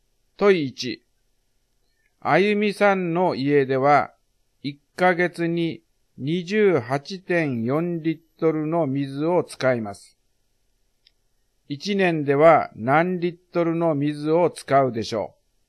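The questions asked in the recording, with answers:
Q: 1年では何リットルの水を使うでしょう。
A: 340.8リットル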